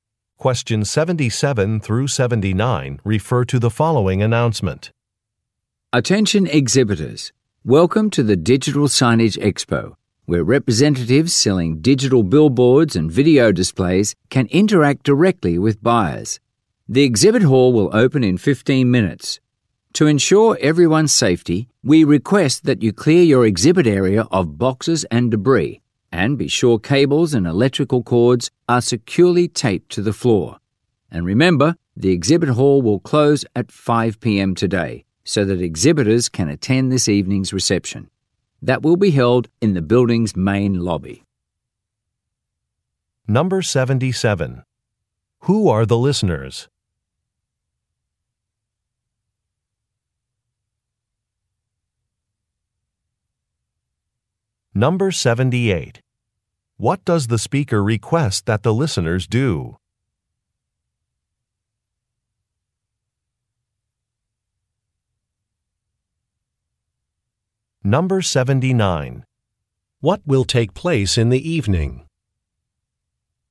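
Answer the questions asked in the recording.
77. Exhibitors at a digital signage expo
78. Clear boxes and debris from their exhibit areas and tape down cables
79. A reception in the main lobby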